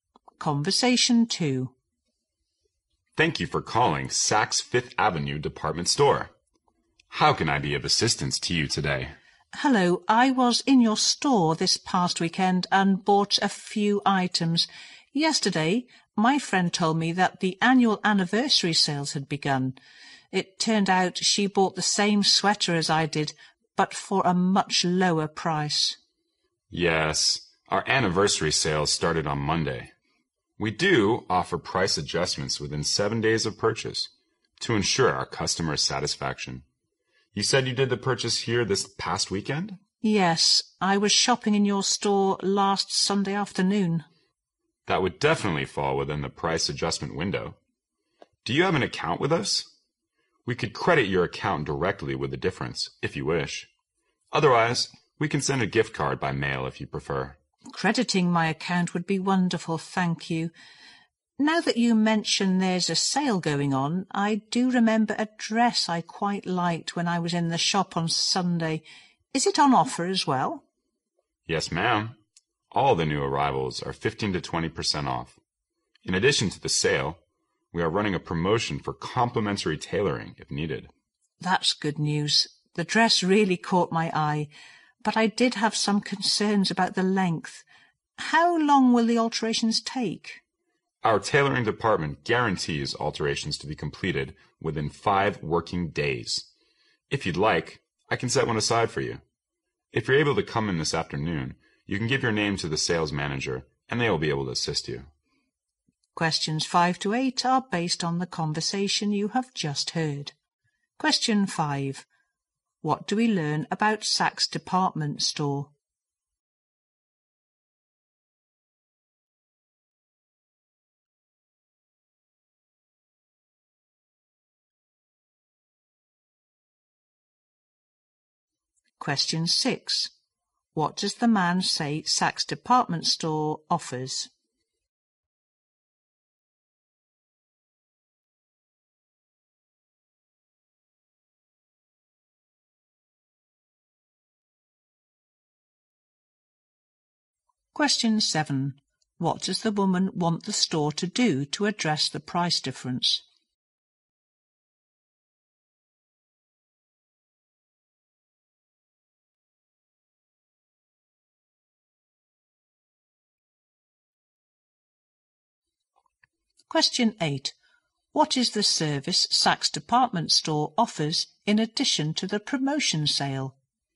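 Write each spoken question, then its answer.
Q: What does the man say Saks Department Store offers?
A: Price adjustments within 7 days of purchase

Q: What does the woman want the store to do to address the price difference?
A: Credit her account with the difference

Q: What is the service Saks Department Store offers in addition to the promotion sale?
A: Free tailoring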